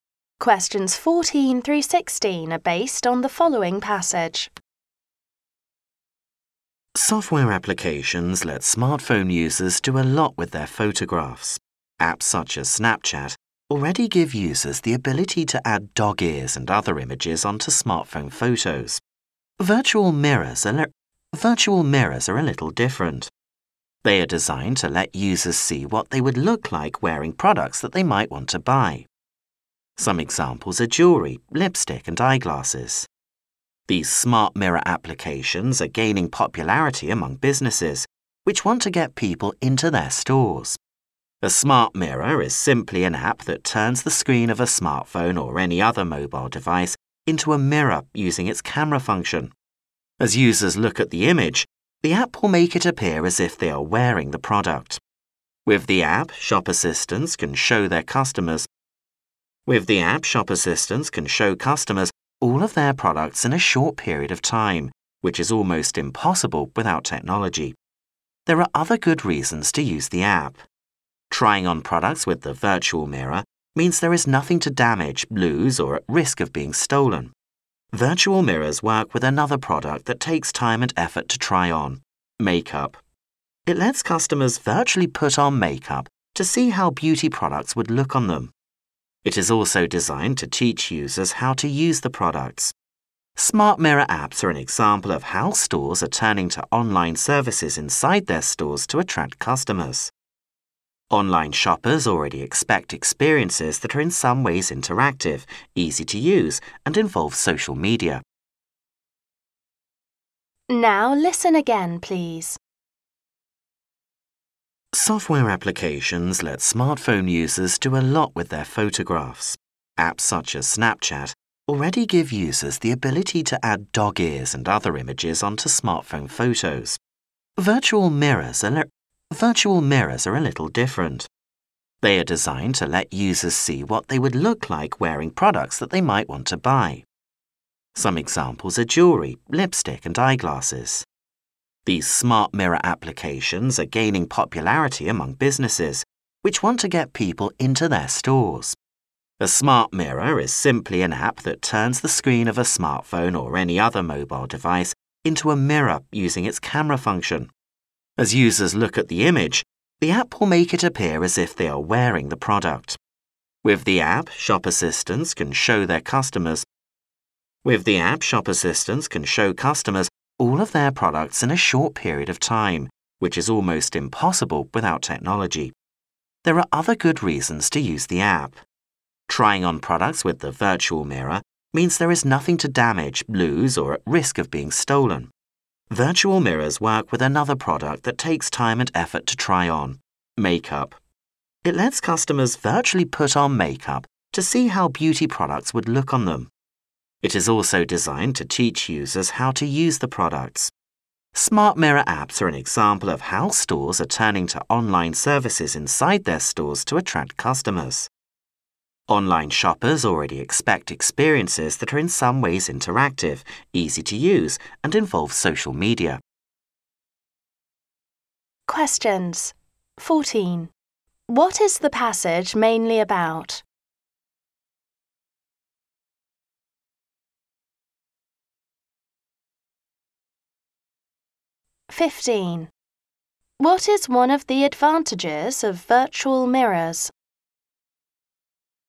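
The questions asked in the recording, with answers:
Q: What is the passage mainly about?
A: Virtual (smart) mirror apps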